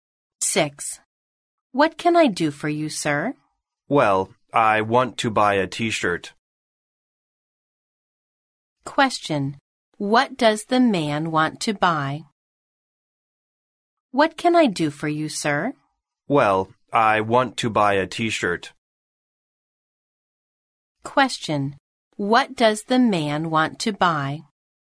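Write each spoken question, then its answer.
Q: What does the man want to buy?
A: A T-shirt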